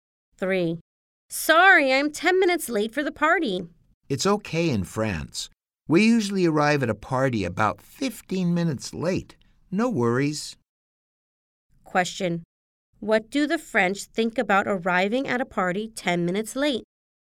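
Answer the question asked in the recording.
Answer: It's okay.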